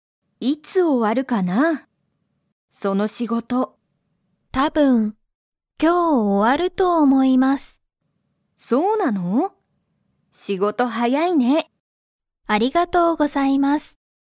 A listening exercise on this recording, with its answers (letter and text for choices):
Comprehension Quiz (Skip if you don't understand the conversation yet)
山田やまださんは、その仕事しごとが____終おわると思おもう。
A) 今いま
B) 今日きょう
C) まだ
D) 毎日まいにち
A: B) 今日きょう

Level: Level 1